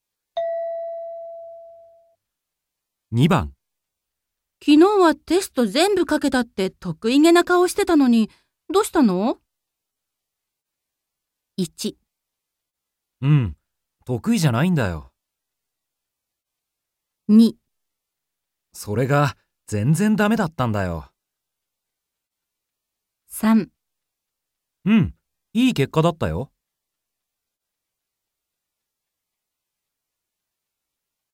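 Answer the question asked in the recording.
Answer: それが、全然だめだったんだよ。

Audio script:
M: 1. うん、得意じゃないんだよ。

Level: N2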